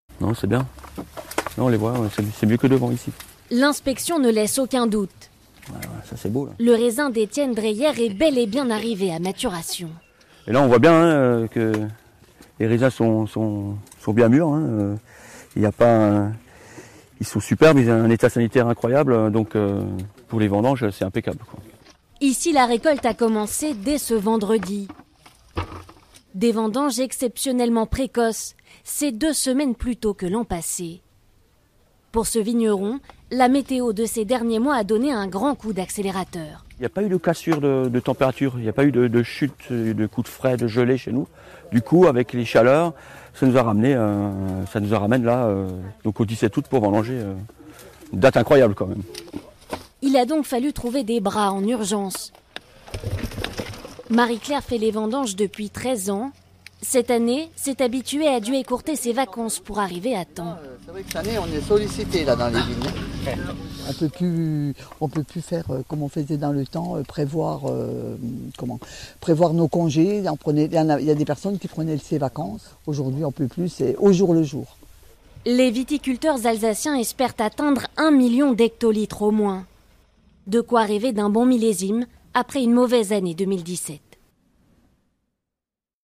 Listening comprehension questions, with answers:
Regardez la vidéo (ou écoutez l'audio) puis répondez aux questions.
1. Pourquoi les vendanges sont-elles précoces cette année ?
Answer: Parce que la météo a été très bonne pour le raisin.

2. Comment a été la météo de ces derniers mois ? Est-ce une bonne nouvelle pour le vigneron ?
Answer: La météo était parfaite et très stable ce qui a accéléré la maturation des raisins. Le vigneron est satisfait car pour les vendanges, c'est impeccable.

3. Quel a été le problème de ces vendanges précoces ?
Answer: Il a fallu trouver très rapidement des personnes disponibles pour faire les vendanges.

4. D'après Marie-Claire, qu'est-ce qui a récemment changé ? Pourquoi ?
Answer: On ne peut plus prévoir ses congés à l'avance comme avant à cause du climat.

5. Quel a été la conséquence pour Marie-Claire ?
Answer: Elle a dû écourter ses vacances.

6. Comment sera le millésime 2018 ?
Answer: Le millésime 2018 sera bon.

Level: B2